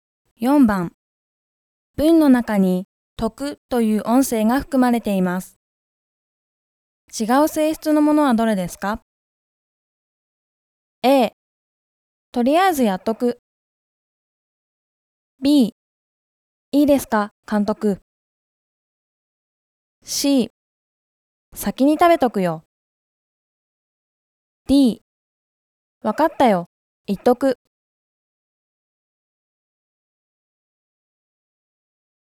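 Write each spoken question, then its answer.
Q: 文の中に「徳」という音声が含まれています。違う性質のものはどれですか?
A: B: いいですか、監督。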